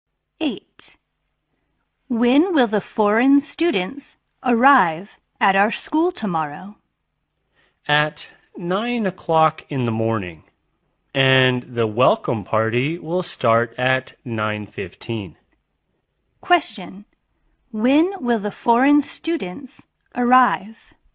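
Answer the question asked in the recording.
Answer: At 9 o'clock in the morning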